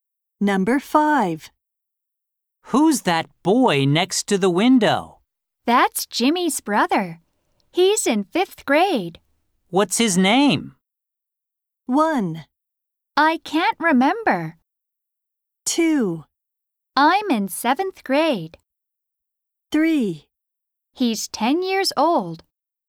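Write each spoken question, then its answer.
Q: What's his name?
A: 1: I can't remember.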